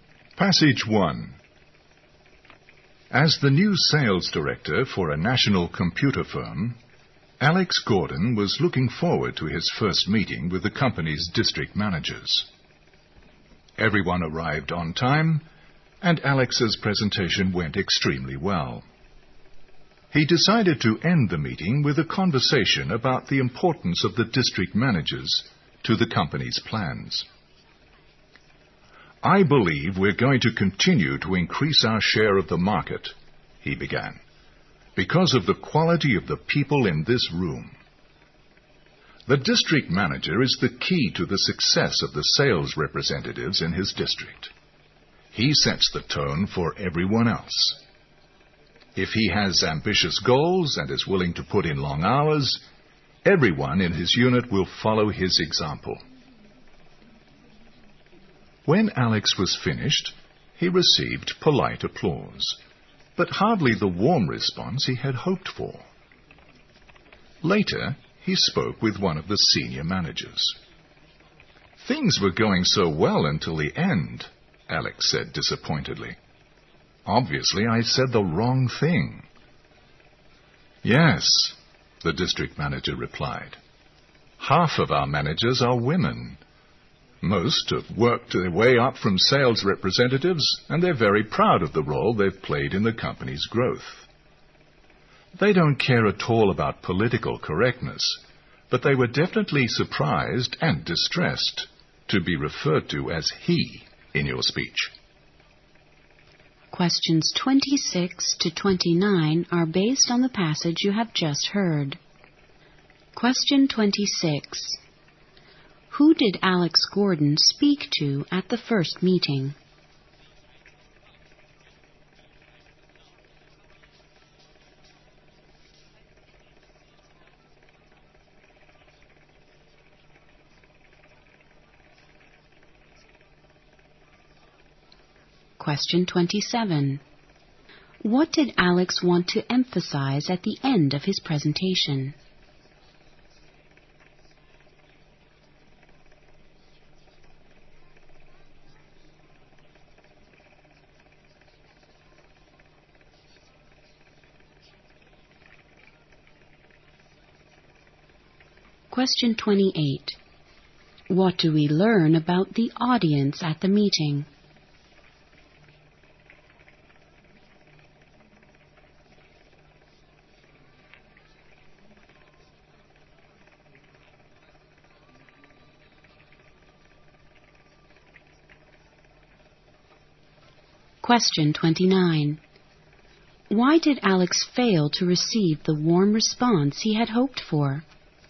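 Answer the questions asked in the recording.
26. The company's district managers
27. How important the district managers are to the company's plans
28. Half of them were women.
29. He referred to the managers as "he", though half of them were women.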